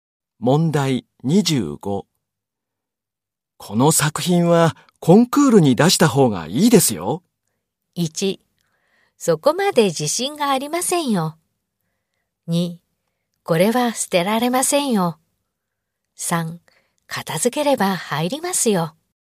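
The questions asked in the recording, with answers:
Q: この作品はコンクールに出した方がいいですよ。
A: 1: そこまで自信がありませんよ。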